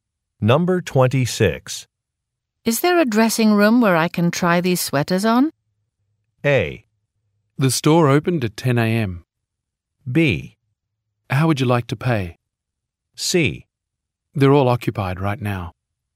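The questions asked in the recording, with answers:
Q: Is there a dressing room where I can try these sweaters on?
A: C: They're all occupied right now.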